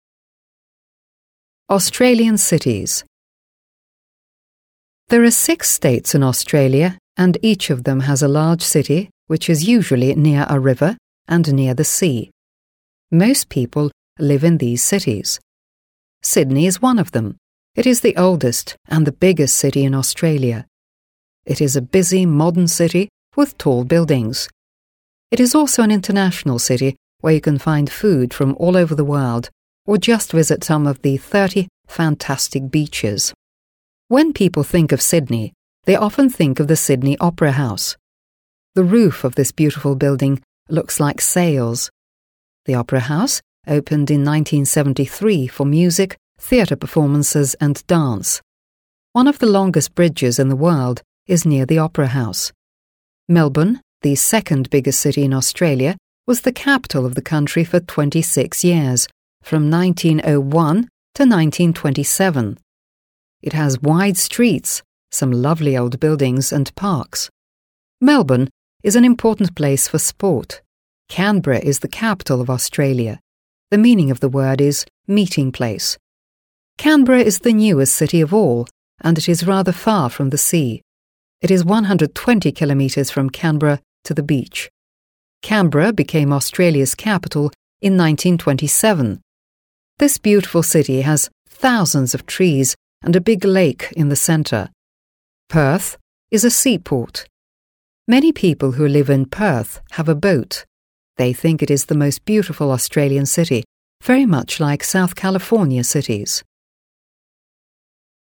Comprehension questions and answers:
Listen and say what Australian cities you can recommend to these tourists:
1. Angela Fox, a music lover;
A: I recommend Sydney

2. Wayne Finn, a sports lover;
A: I recommend Melbourne

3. Patrick Wilson, a successful businessman who doesn't want to have his office near the sea in Australia but prefers to have it in a big modern city;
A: I recommend Canberra

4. Greg Tyson, a lover of sea voyages and short boat trips.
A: I recommend Perth

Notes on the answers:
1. ключевой подсказкой является «Opera House opened... for music» (Оперный театр открылся... для музыки), который находится в Сиднее.
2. мы находим прямое указание в тексте: «Melbourne is an important place for sport» (Мельбурн — важное место для спорта).
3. ищет город вдали от моря («doesn't want... near the sea»). В тексте про Канберру сказано: «it is rather far from the sea» (она находится довольно далеко от моря), что делает её единственным подходящим вариантом, так как остальные крупные города описаны как прибрежные.
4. любит лодки. Про Перт сказано: «Perth is a seaport. Many people... have a boat» (Перт — морской порт. У многих людей... есть лодка).

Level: 7 класс